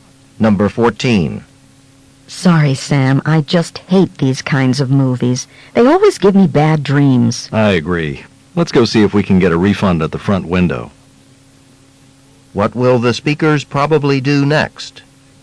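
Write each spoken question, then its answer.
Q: What will the speakers probably do next?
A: Try to get a refund and leave the movie.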